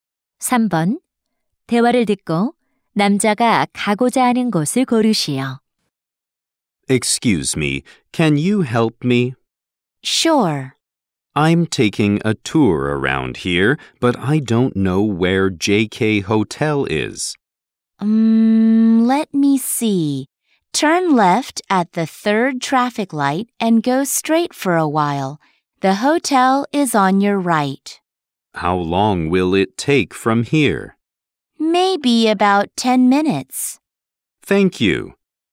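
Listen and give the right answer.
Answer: JK 호텔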